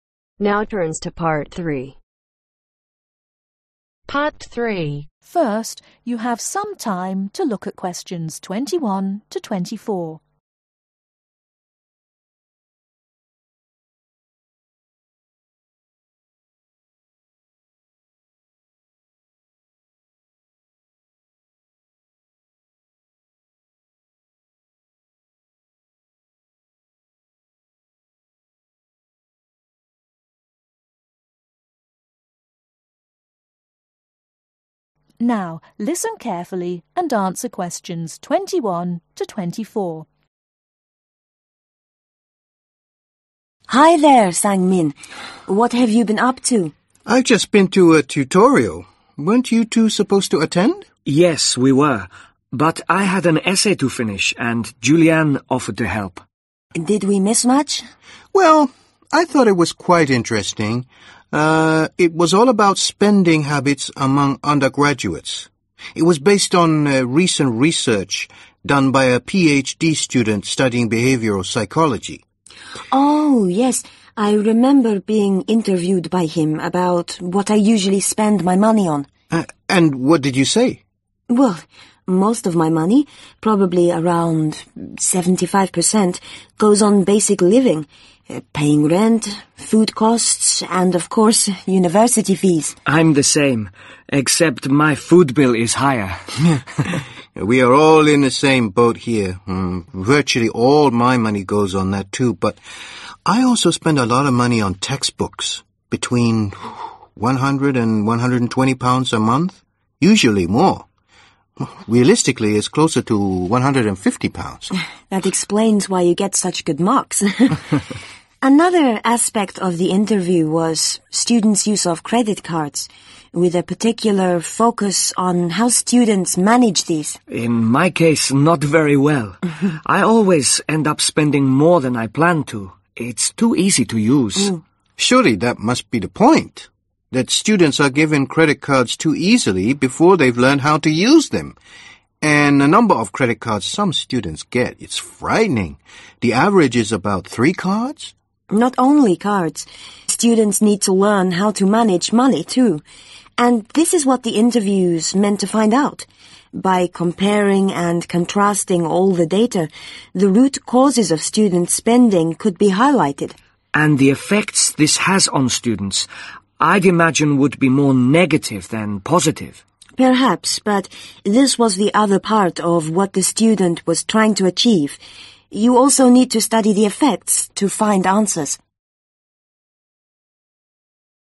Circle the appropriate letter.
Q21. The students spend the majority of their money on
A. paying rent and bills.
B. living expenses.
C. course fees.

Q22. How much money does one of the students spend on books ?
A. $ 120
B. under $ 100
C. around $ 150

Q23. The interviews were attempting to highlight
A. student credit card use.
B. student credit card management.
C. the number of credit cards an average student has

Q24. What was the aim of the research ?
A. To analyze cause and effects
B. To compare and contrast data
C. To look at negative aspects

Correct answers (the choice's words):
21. living expenses.
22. around $ 150
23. student credit card management.
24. To analyze cause and effects